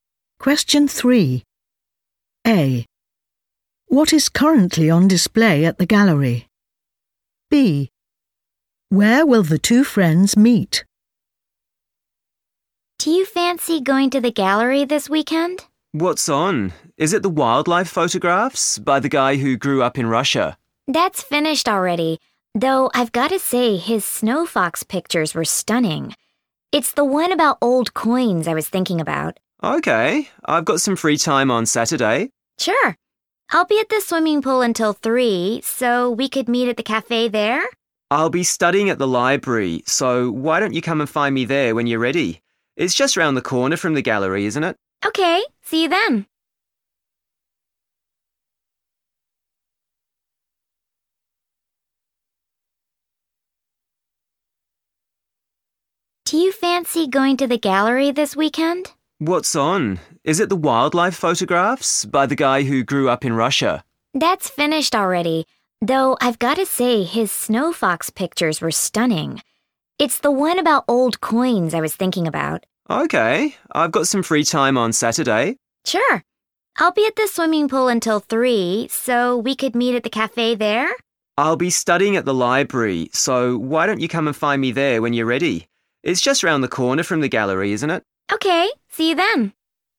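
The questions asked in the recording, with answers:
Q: What is currently on display at the gallery?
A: old coins

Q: Where will the two friends meet?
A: at the library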